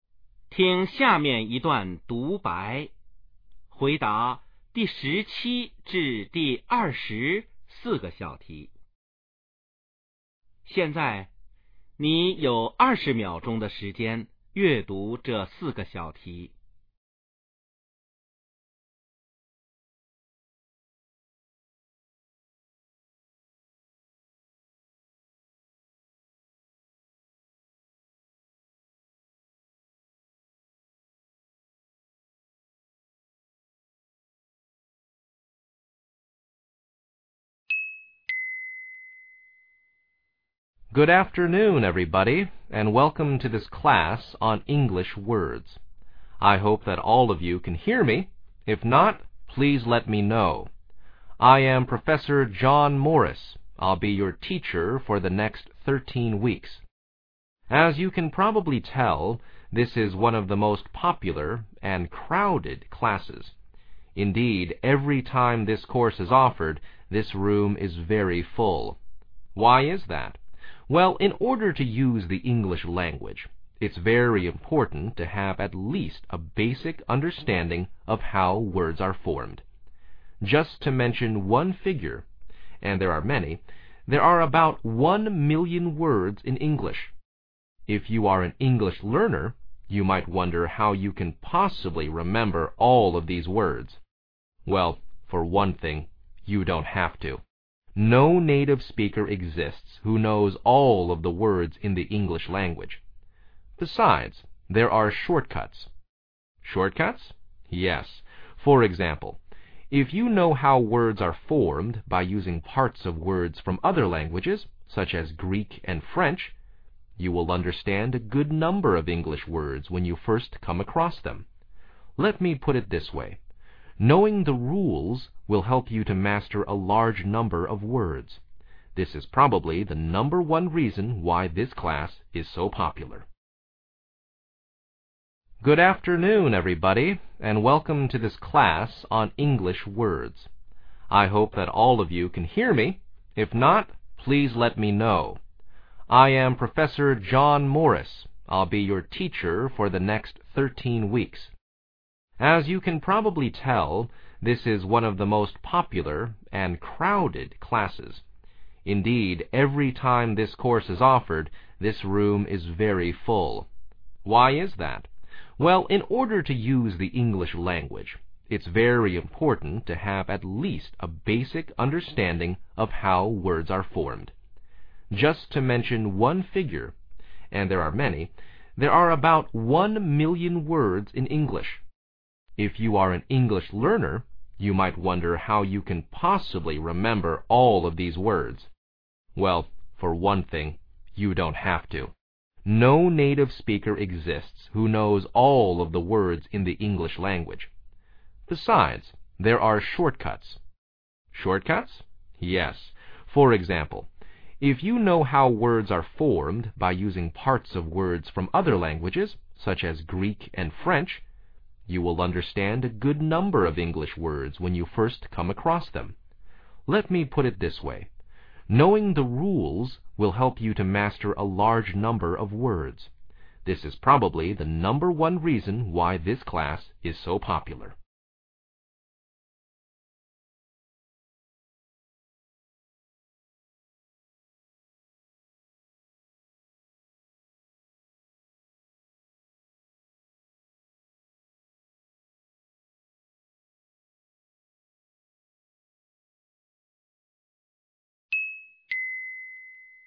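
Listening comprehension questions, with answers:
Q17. Where can you most probably hear this talk?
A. In a class of the English language.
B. In a class of the Greek language.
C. In a class of the French language.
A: In a class of the English language.

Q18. How long does the class last?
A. 11 weeks.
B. 13 weeks.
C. 15 weeks.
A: 13 weeks.

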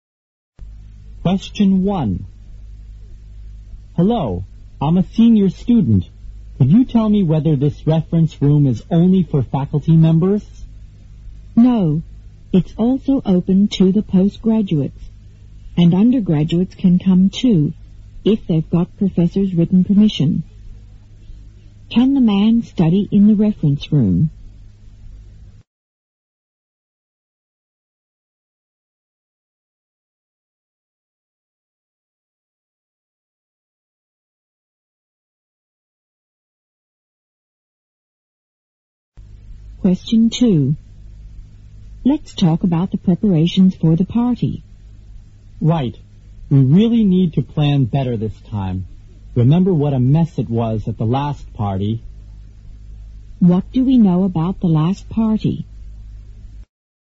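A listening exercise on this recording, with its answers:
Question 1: Can the man study in the reference room?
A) No, it's open only to teachers and postgraduates.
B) Yes, he can study there if he is writing a research paper.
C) Yes, because he is a senior student.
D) Yes, but he needs the approval by his professor.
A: Yes, but he needs the approval by his professor.

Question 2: What do we know about the last party?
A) It was pretty good.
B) It was rather dull.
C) It was not well organized.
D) It was attended by many people.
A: It was not well organized.

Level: 六级

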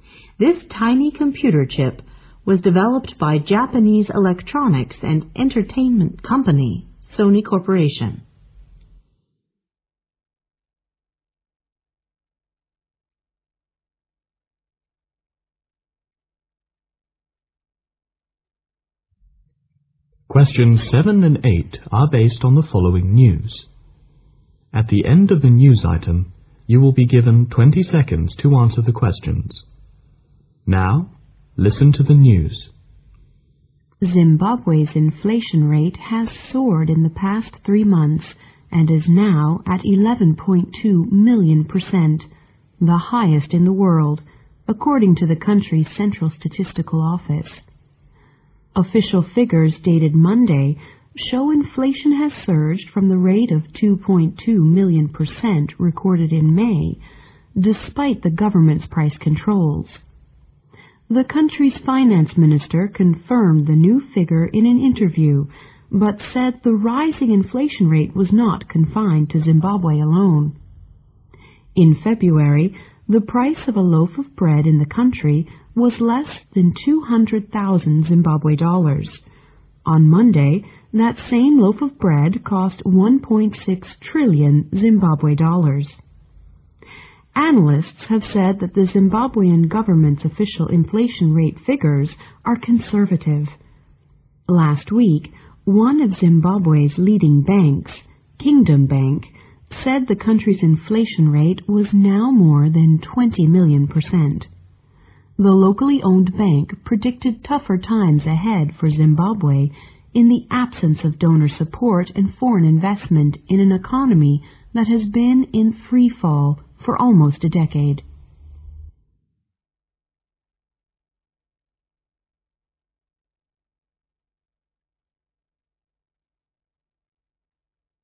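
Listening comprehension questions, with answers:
Now listen to the news.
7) Which of the following is mentioned as the government's measure to control inflation?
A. Foreign investment.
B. Donor support.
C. Price control.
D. Bank prediction.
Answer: Price control.

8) According to Kingdom Bank, what is the current inflation rate in Zimbabwe?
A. 20 million percent.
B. 2.2 million percent.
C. 11.2 million percent.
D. Over 11.2 million percent.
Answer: 20 million percent.

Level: 英语专业八级

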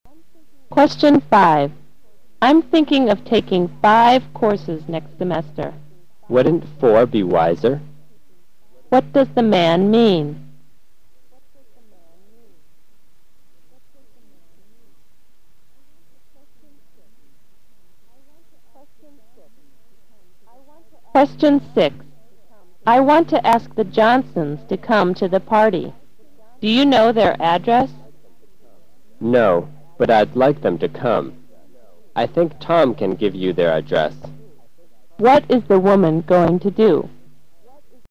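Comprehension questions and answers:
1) What does the man mean?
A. There are too many courses offered to students.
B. The woman should take fewer courses next term.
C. The man will take four courses next semester.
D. It is wiser to take more than four courses.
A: The woman should take fewer courses next term.

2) What is the woman going to do?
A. Ask Tom to send an invitation.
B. Get the Johnsons' address.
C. Invite Tom to the party.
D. Tell Tom to pick up the Johnsons.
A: Get the Johnsons' address.

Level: 大学英语四级

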